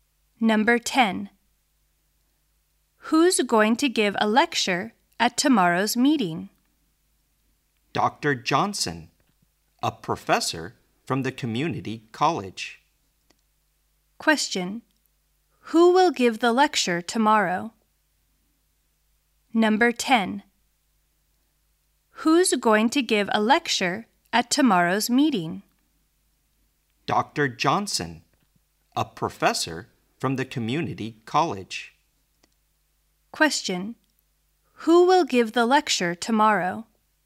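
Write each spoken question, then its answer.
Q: Who will give the lecture tomorrow?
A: Dr. Johnson, a professor from the community college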